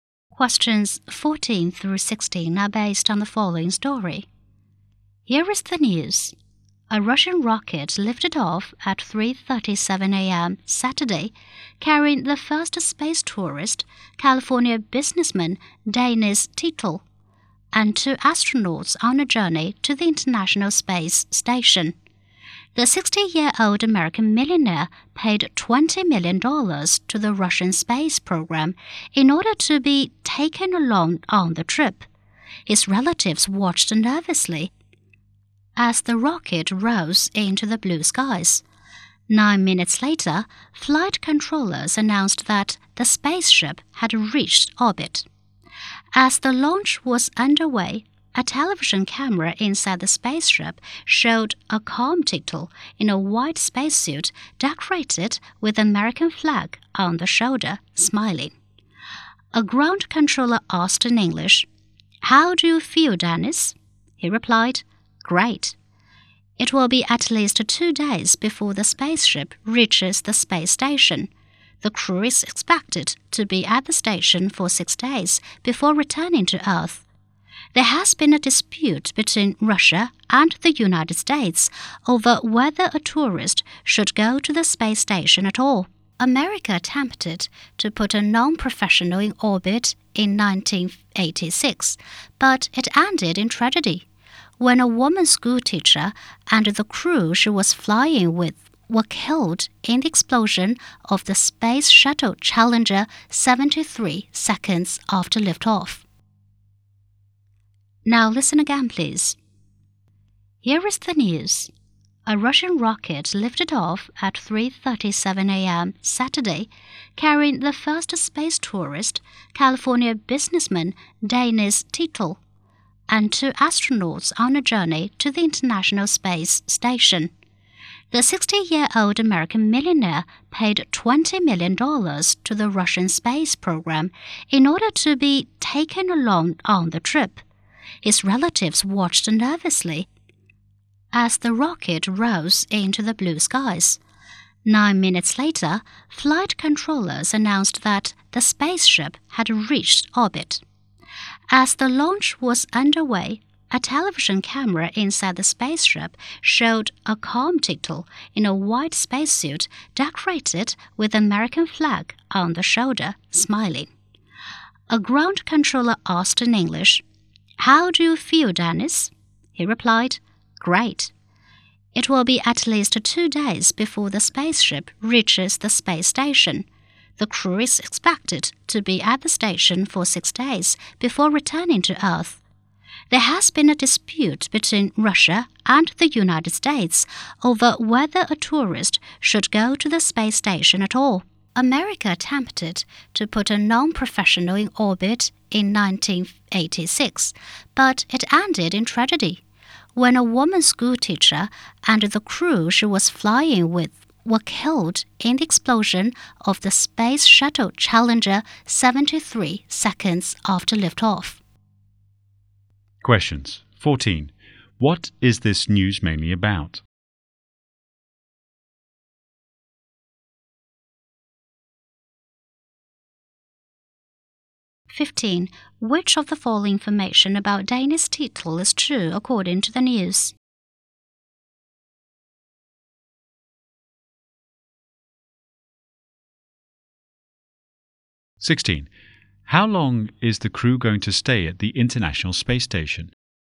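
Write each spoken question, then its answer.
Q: What is this news mainly about?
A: The first space tourist's trip to the International Space Station

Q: How long is the crew going to stay at the International Space Station?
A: 6 days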